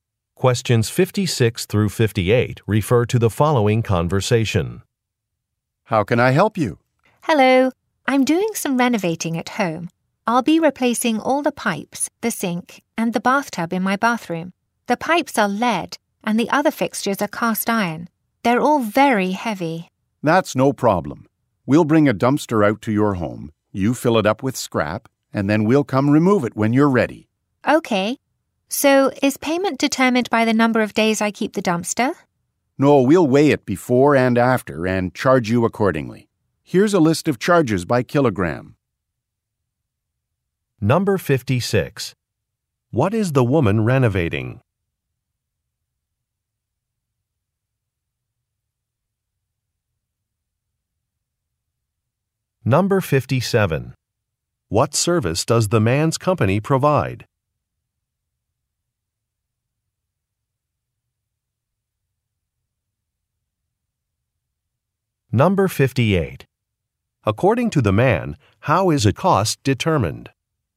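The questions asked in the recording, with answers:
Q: What is the woman renovating?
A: Her bathroom

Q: What service does the man's company provide?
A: Dumpster rental and scrap removal

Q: According to the man, how is a cost determined?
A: By weight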